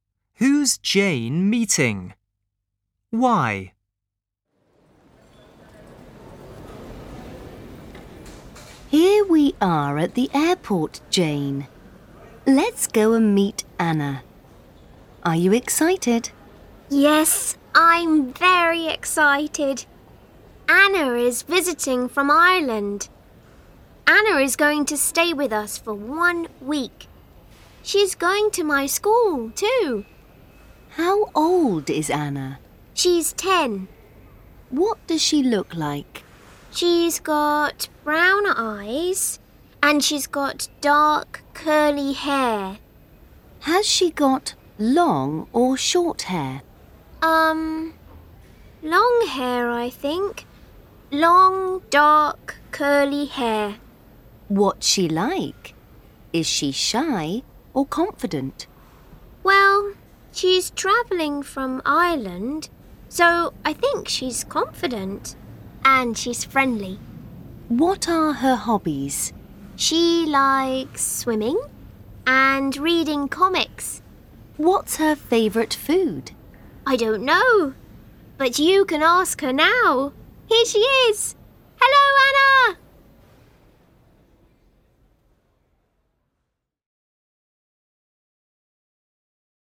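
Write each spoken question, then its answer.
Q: Who's Jane meeting?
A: Anna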